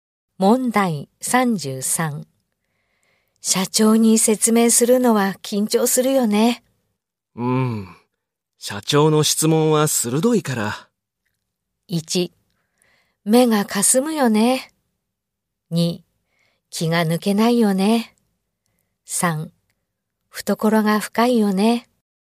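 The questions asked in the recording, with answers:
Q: 社長に説明するのは緊張するよね。社長の質問は鋭いから。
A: 2: 気が抜けないよね。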